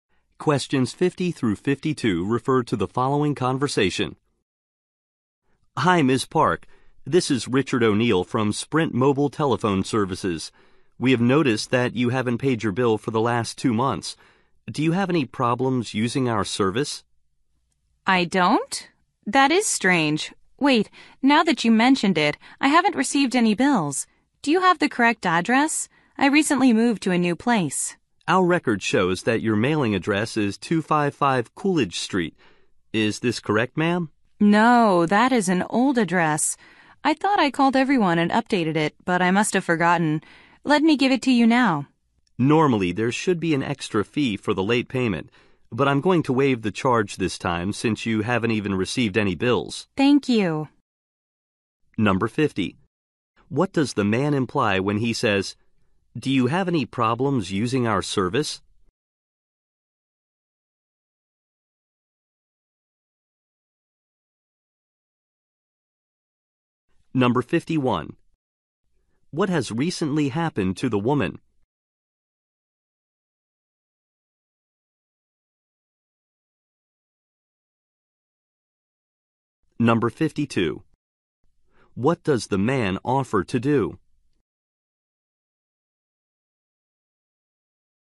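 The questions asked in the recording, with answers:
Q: What does the man imply when he says, "Do you have any problems using our service?"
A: He wants to know why she hasn't paid her bill

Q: What has recently happened to the woman?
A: She moved to a new place

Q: What does the man offer to do?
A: Waive the late fee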